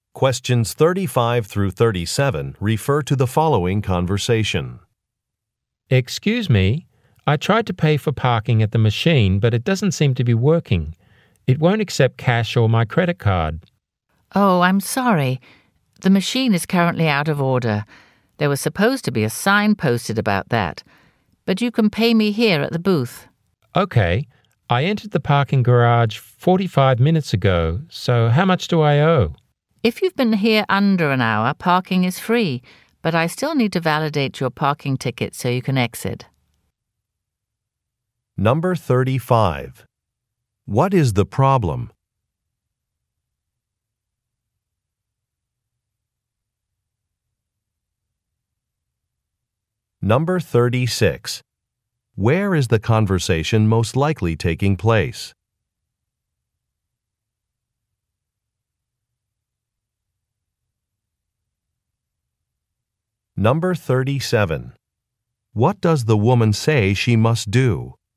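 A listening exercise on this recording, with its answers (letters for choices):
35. What is the problem?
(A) A machine is not working.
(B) A credit card is damaged.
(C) A schedule is incorrect.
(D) A roadway is blocked.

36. Where is the conversation most likely taking place?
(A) At a bank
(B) At a bus stop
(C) At a parking garage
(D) At a department store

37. What does the woman say she must do?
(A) Close a facility early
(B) Verify an address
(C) Get a supervisor's signature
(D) Validate a ticket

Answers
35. A
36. C
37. D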